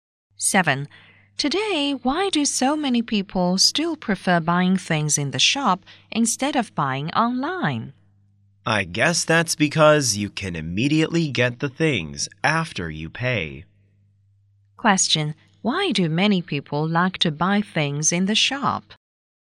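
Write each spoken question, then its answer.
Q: Why do many people like to buy things in the shop?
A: They can get the things immediately after paying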